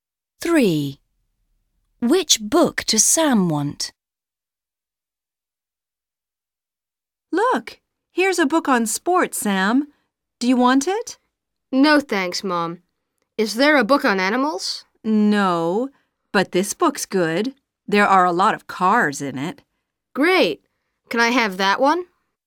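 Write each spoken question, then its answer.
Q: Which book does Sam want?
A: the book about cars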